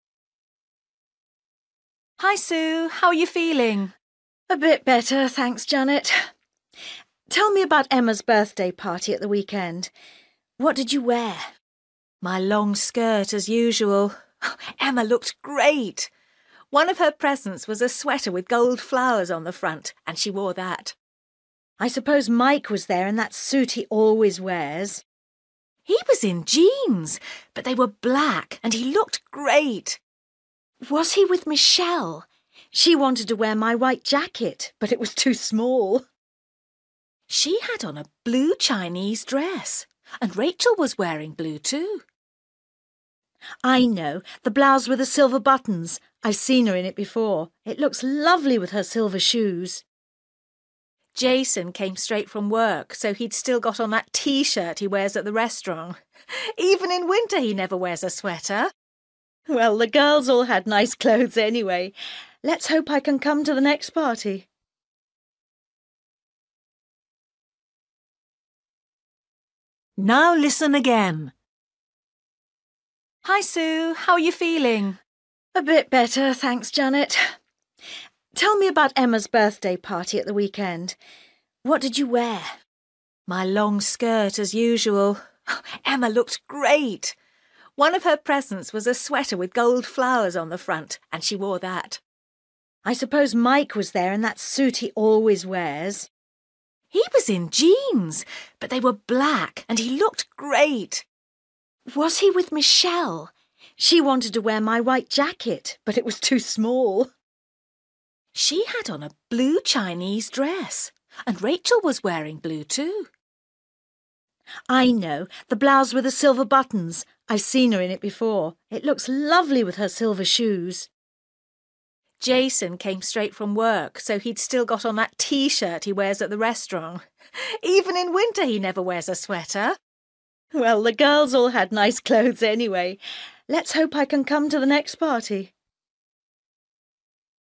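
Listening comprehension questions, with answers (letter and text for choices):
For each question, choose the correct answer.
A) blouse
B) dress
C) jacket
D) jeans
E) skirt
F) suit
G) sweater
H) T-shirt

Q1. Emma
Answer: G) sweater

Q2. Mike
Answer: D) jeans

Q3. Michelle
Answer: B) dress

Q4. Rachel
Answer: A) blouse

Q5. Jason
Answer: H) T-shirt

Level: Luyện nghe trình độ A2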